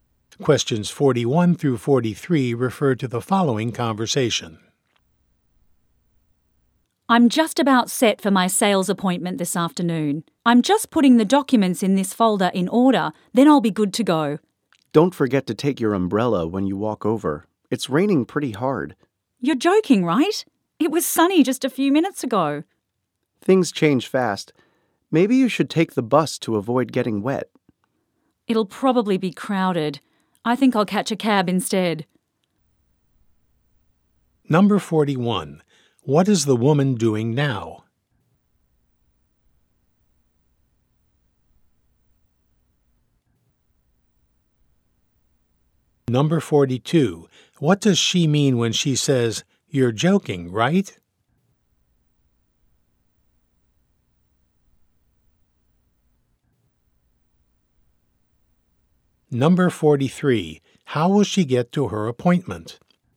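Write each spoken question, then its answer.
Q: What is the woman doing now?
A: Putting documents in order in a folder

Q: What does she mean when she says, "You're joking, right?"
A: She is surprised that it is raining

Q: How will she get to her appointment?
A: By taxi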